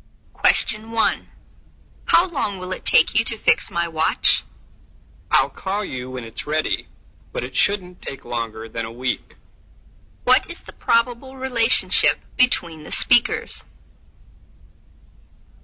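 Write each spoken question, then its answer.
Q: What is the probable relationship between the speakers?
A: Customer and watch repairer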